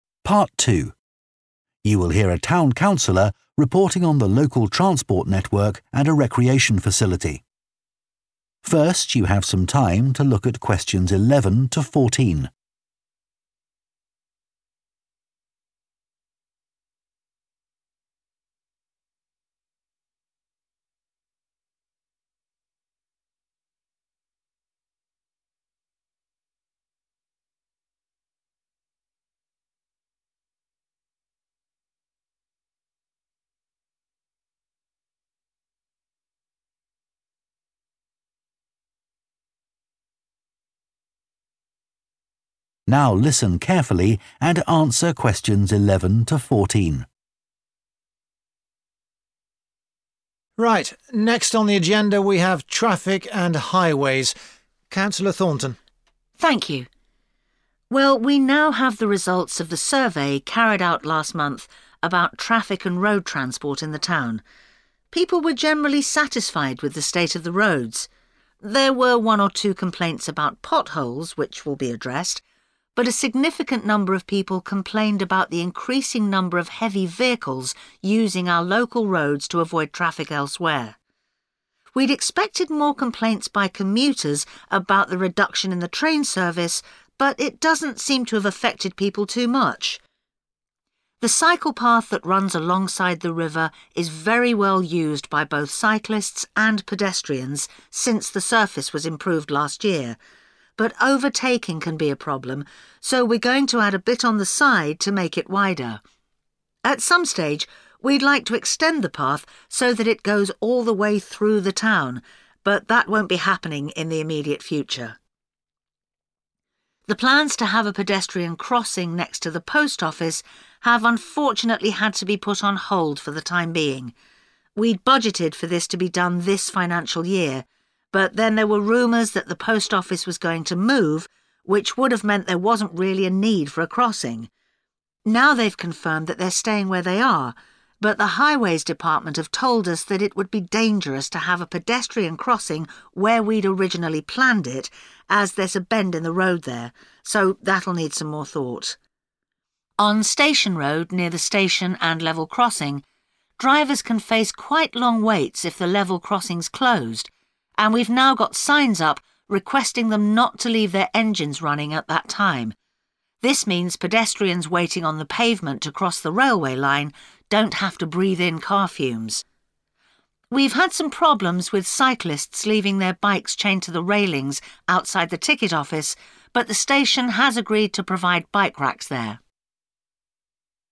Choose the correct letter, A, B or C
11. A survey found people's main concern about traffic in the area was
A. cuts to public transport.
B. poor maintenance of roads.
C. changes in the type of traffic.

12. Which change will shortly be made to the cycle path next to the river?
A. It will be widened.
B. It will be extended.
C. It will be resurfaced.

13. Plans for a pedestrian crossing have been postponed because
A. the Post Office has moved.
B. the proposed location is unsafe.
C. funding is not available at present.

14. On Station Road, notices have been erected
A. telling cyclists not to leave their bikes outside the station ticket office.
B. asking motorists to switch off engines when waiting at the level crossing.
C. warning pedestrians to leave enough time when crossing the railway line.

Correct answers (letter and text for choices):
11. C. changes in the type of traffic.
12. A. It will be widened.
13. B. the proposed location is unsafe.
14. B. asking motorists to switch off engines when waiting at the level crossing.

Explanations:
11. [một số lượng đáng kể người dân phàn nàn về việc ngày càng có nhiều phương tiện giao thông hạng nặng = sự thay đổi về loại phương tiện ⇒ đáp án C]
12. [chúng tôi sẽ thêm một chút ở bên cạnh để làm cho nó rộng hơn ⇒ đáp án A]
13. [sẽ rất nguy hiểm nếu có vạch sang đường dành cho người đi bộ ở nơi mà chúng tôi đã lên kế hoạch ban đầu vì ở đó có một khúc cua = vị trí không an toàn ⇒ đáp án B]
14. [yêu cầu họ không để động cơ của họ đang hoạt động tại thời điểm đó = yêu cầu người lái xe ô tô tắt máy khi dừng chờ ở đường ngang ⇒ đáp án B]